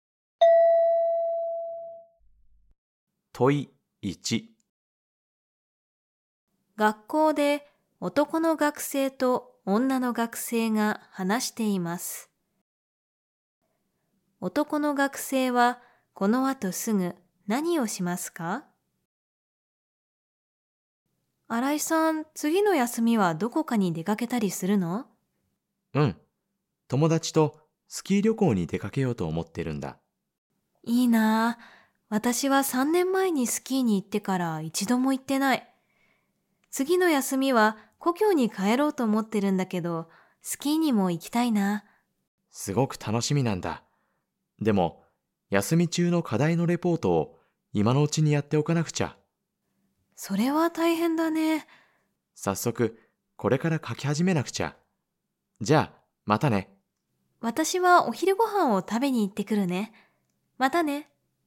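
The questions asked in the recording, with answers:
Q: 男の学生はこの後すぐ何をしますか?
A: 休み中の課題のレポートを書き始める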